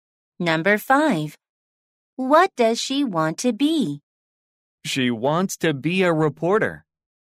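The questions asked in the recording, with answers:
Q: What does she want to be?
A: a reporter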